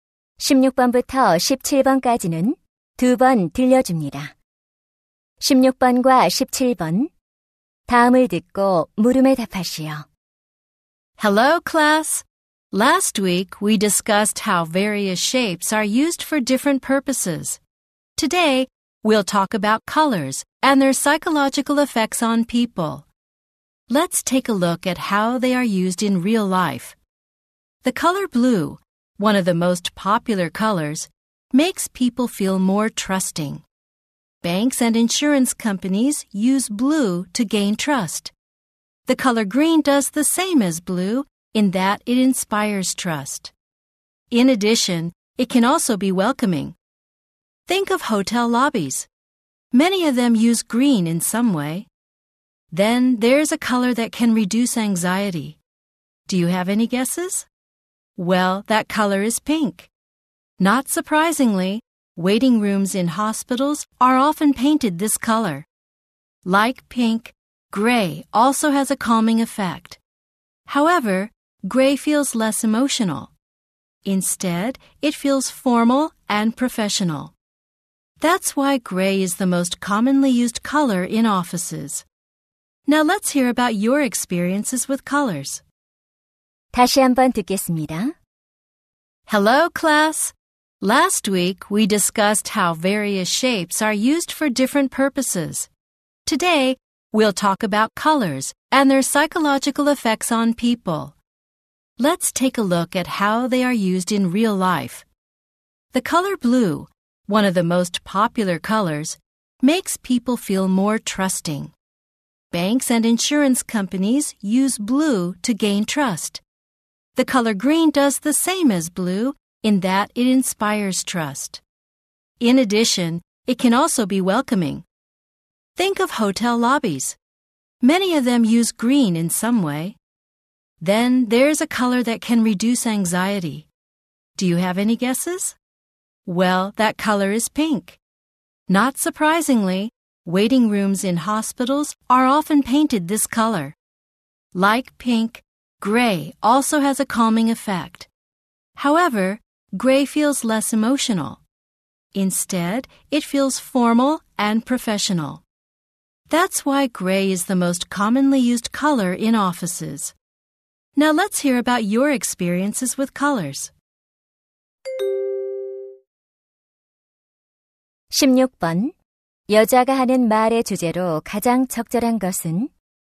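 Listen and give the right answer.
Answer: 색깔이 사람에게 주는 심리적 효과와 그 활용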